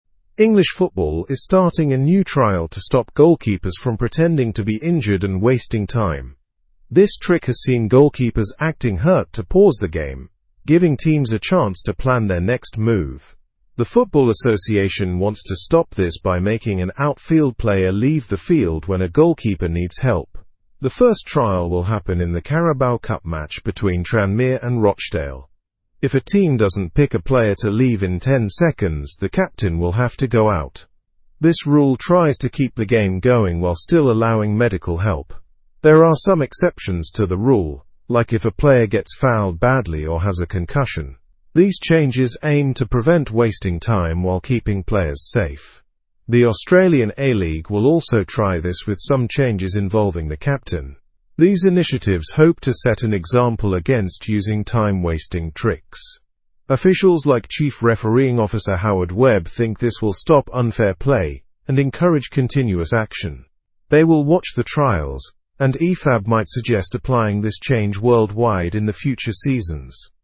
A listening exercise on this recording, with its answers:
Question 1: Why is English football implementing a new trial?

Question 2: What must happen if a team doesn't nominate a player fast enough?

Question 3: What match will first feature this new trial?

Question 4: What are exceptions to this new rule?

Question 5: What similar action is the Australian A-League taking?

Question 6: Who is one of the officials involved in designing the trial?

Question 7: What future implications might the trial have globally?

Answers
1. To stop the use of goalkeepers pretending to be injured and wasting time.
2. The captain will automatically take the place and leave the pitch.
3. The Carabao Cup match between Tranmere and Rochdale.
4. Exceptions include fouls causing immediate treatment or concussion cases.
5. The Australian A-League is conducting a similar trial with some modifications.
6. Chief refereeing officer Howard Webb.
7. If successful, the trial could lead to international rule changes.

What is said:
English football is starting a new trial to stop goalkeepers from pretending to be injured and wasting time. This trick has seen goalkeepers acting hurt to pause the game, giving teams a chance to plan their next move. The Football Association wants to stop this by making an outfield player leave the field when a goalkeeper needs help. The first trial will happen in the Carabao Cup match between Tranmere and Rochdale. If a team doesn't pick a player to leave in ten seconds, the captain will have to go out. This rule tries to keep the game going while still allowing medical help. There are some exceptions to the rule, like if a player gets fouled badly or has a concussion. These changes aim to prevent wasting time while keeping players safe. The Australian A-League will also try this with some changes involving the captain. These initiatives hope to set an example against using time-wasting tricks. Officials like chief refereeing officer Howard Webb think this will stop unfair play and encourage continuous action. They will watch the trials, and Ifab might suggest applying this change worldwide in the future seasons.

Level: Level 3